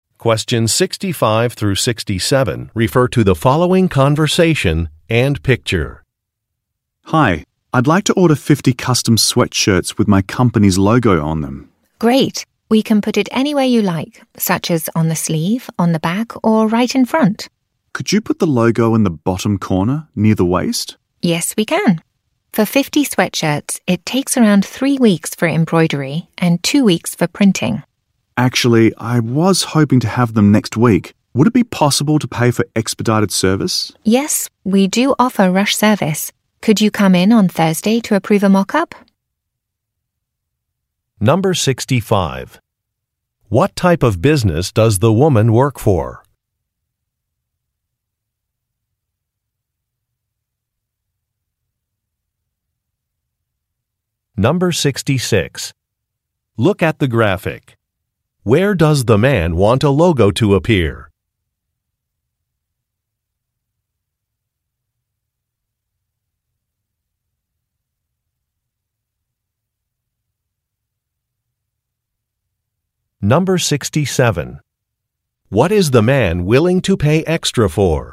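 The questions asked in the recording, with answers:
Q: What type of business does the woman work for?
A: A custom clothing (sweatshirt printing and embroidery) company

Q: What is the man willing to pay extra for?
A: Expedited (rush) service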